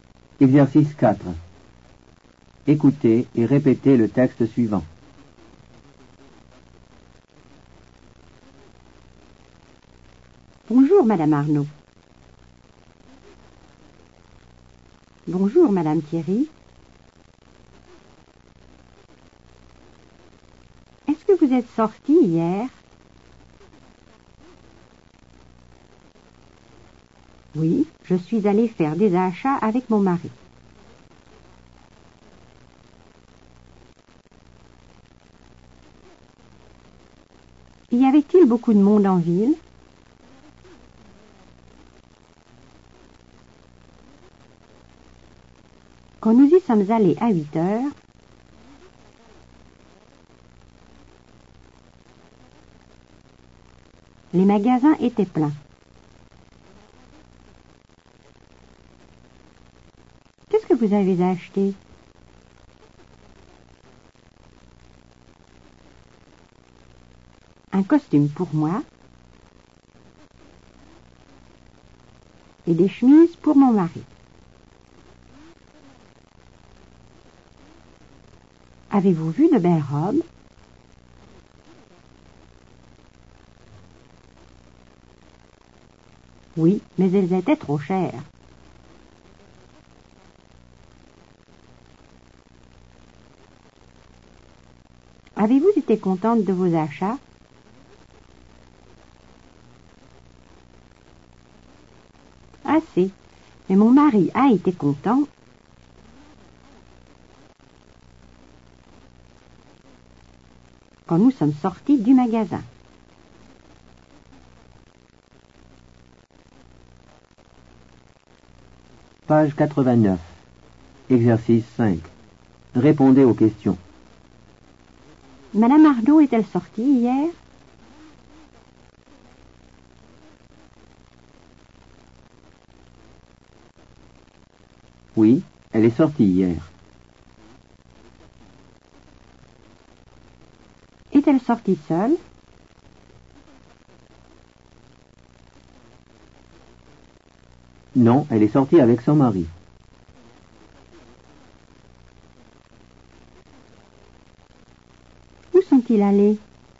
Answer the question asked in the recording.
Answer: Ils sont allés faire des achats.